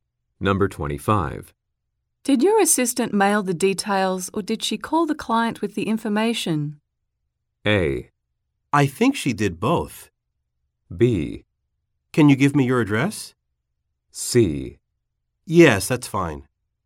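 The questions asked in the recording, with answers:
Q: Did your assistant mail the details or did she call the client with the information?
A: A: I think she did both.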